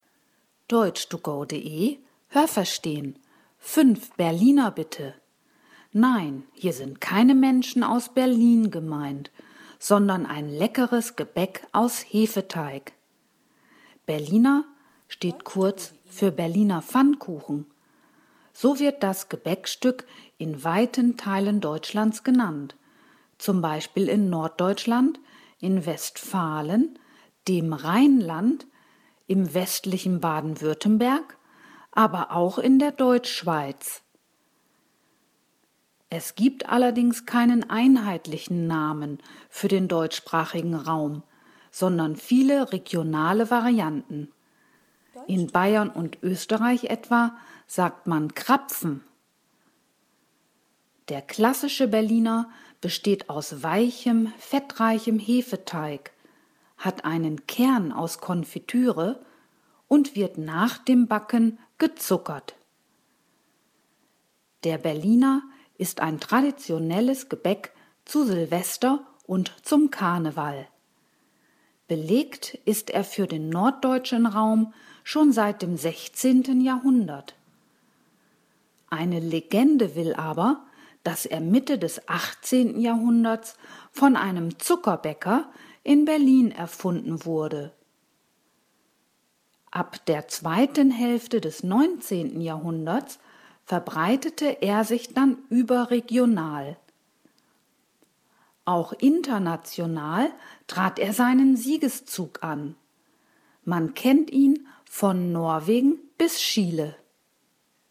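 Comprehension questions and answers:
Welches Verb passt?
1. Hier sind keine Menschen aus Berlin _____ .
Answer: gemeint

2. „Berliner" _____ kurz für Berliner Pfannkuchen.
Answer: steht

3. Das Gebäck wird nach dem Backen _____ .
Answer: gezuckert

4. _____ ist der Berliner für den norddeutschen Raum schon seit dem 16. Jahrhundert.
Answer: Belegt

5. Auch international _____ er seinen Siegeszug an.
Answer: trat

Was haben Sie gehört? Es gibt nur eine korrekte Antwort.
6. Berliner nennt man nicht nur Menschen aus Berlin, sondern auch ...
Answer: ein leckeres Gebäck aus Hefeteig

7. Das Gebäck heißt „Berliner" unter anderem in ...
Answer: Norddeutschland, Westfalen, dem Rheinland, der Deutschschweiz

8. In Bayern sagt man zum „Berliner" ...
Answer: Krapfen

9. Das Gebäck besteht aus weichem, ...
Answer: fettreichem Hefeteig

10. Beim klassischen Berliner gehört zu den Zutaten auch ...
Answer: Konfitüre

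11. Das Gebäck soll von einem Berliner Zuckerbäcker _____ worden sein.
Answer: erfunden

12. Man kennt den Berliner laut Text von ...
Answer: Norwegen bis Chile

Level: Hörtexte B (mittel)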